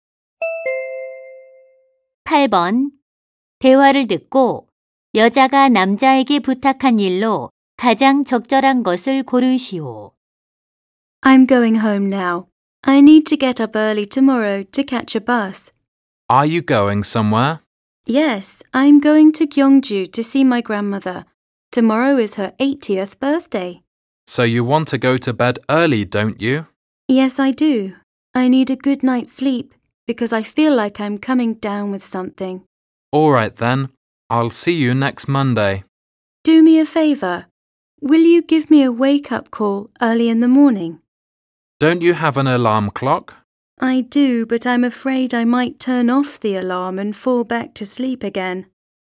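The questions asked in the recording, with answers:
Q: 대화를 듣고 여자가 남자에게 부탁한 일로 가장 적절한 것을 고르시오.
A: 아침 일찍 깨워 주는 전화하기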